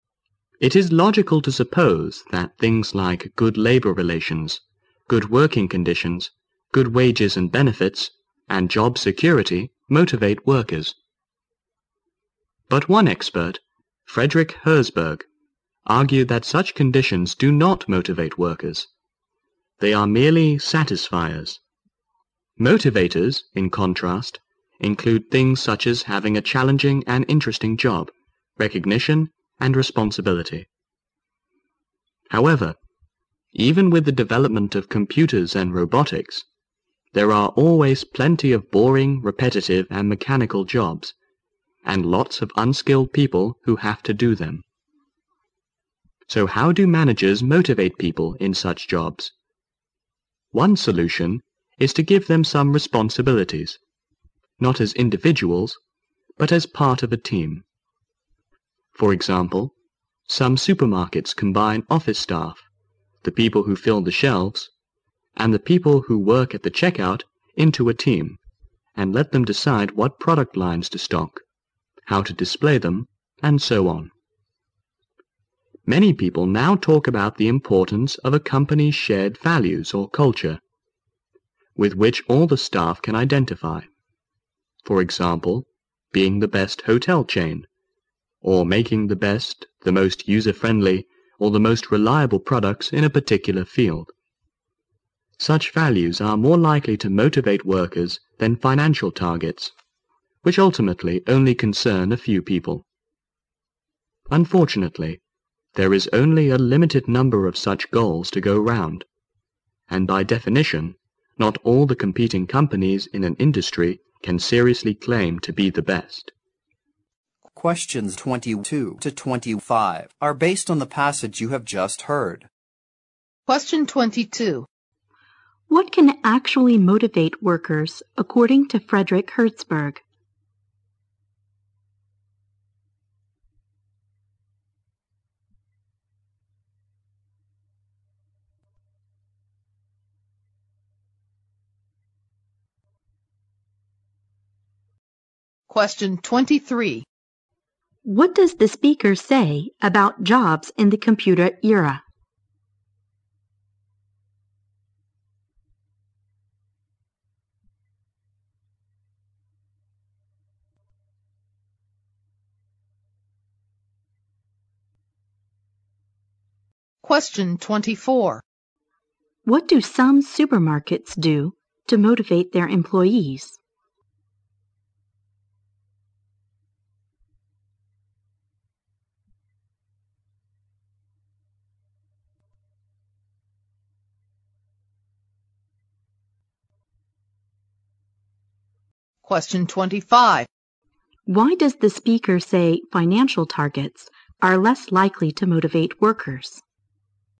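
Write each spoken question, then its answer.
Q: What can actually motivate workers, according to Frederick Herzberg?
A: Having a challenging and interesting job, recognition and responsibility.

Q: What does the speaker say about jobs in the computer era?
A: There are still plenty of boring, repetitive and mechanical jobs.

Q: What do some supermarkets do to motivate their employees?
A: They combine staff into teams and let them decide what product lines to stock and how to display them.

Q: Why does the speaker say financial targets are less likely to motivate workers?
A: They ultimately concern only a few people.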